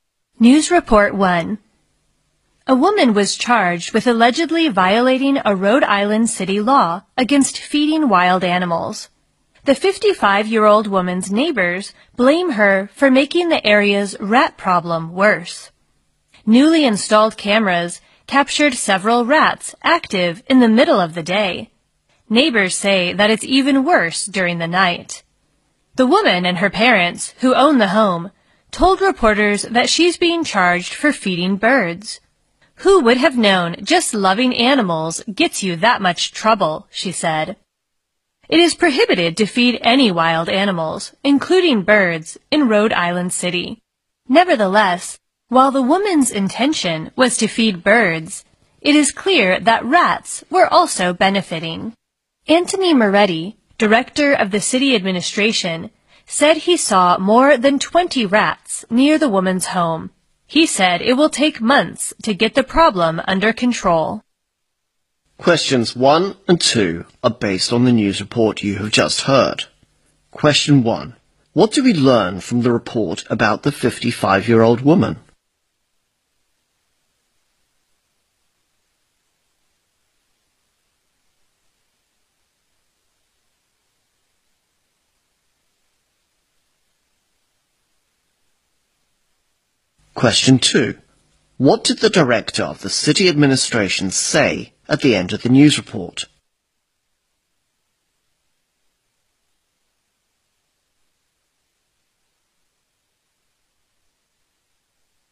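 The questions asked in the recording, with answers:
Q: What do we learn from the report about the 55-year-old woman?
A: She was charged with violating a city law against feeding wild animals.

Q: What did the director of the city administration say at the end of the news report?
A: It will take months to get the rat problem under control.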